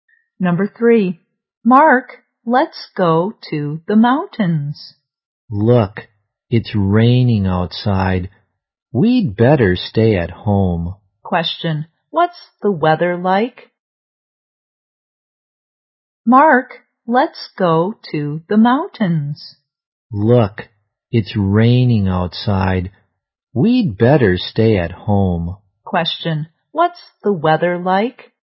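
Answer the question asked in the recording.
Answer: Rainy.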